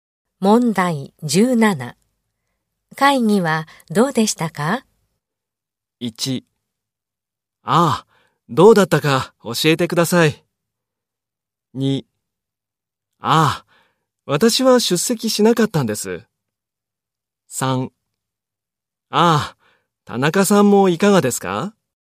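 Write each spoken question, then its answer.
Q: 会議はどうでしたか?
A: 2: ああ、私は出席しなかったんです。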